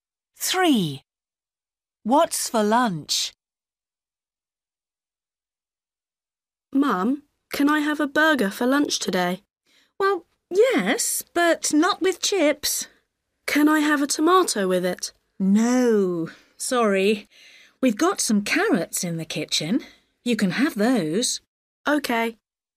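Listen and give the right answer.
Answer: a burger with carrots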